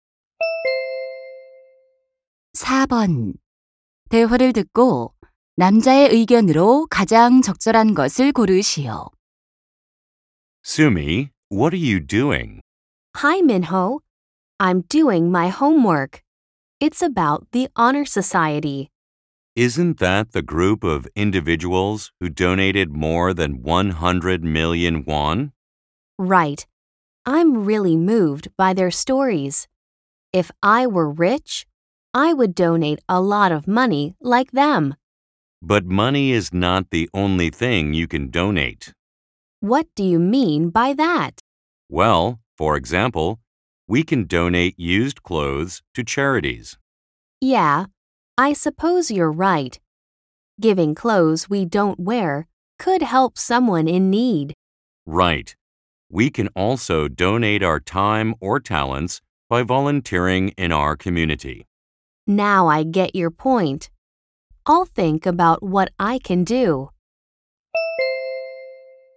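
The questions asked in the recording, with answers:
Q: 대화를 듣고 남자의 의견으로 가장 적절한 것을 고르시오.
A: 돈 외에도 옷, 시간, 재능 등 다양한 것을 기부할 수 있다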